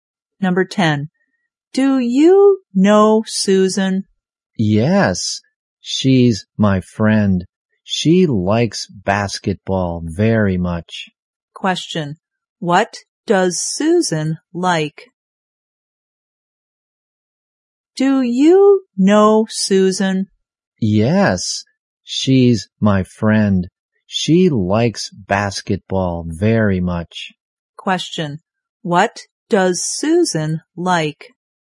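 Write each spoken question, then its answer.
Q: What does Susan like?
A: Basketball.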